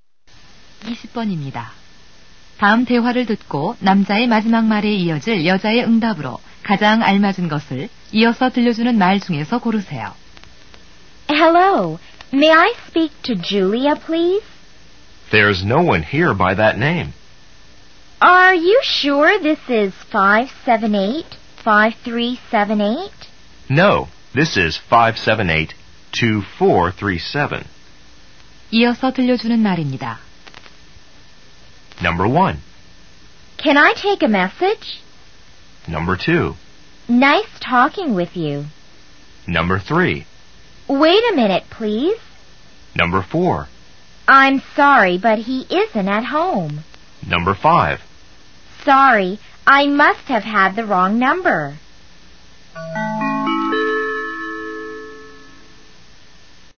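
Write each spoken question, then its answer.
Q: 다음 대화를 듣고 남자의 마지막 말에 이어질 여자의 응답으로 가장 알맞은 것을 이어서 들려주는 말 중에서 고르세요.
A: 5: Sorry, I must have had the wrong number.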